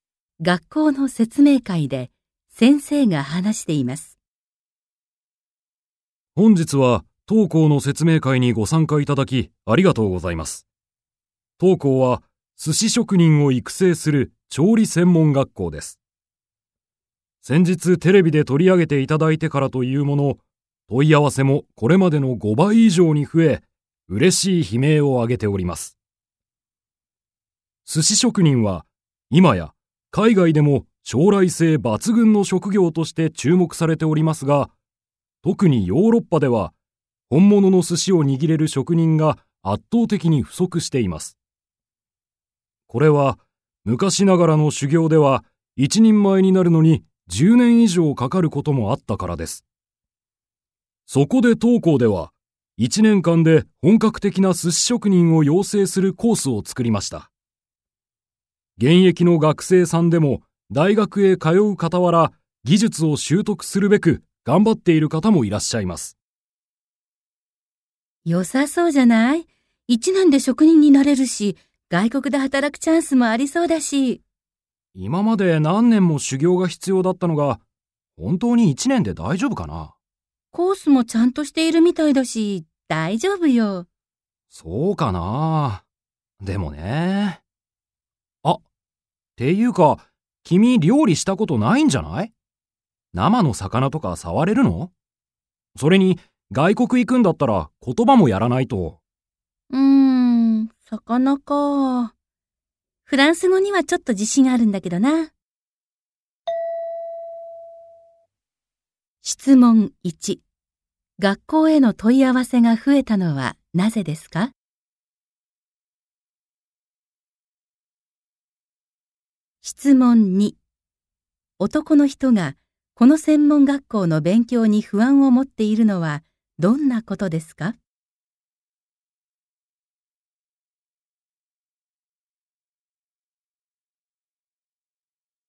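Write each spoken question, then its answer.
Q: 学校への問い合わせが増えたのはなぜですか?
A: テレビで学校が取り上げられたから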